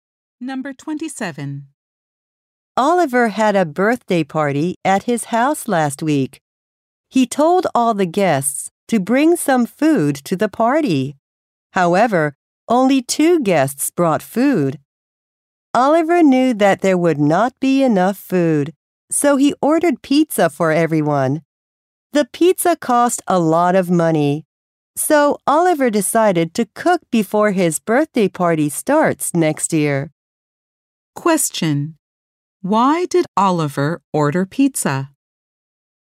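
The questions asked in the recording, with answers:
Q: Why did Oliver order pizza?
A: There was not enough food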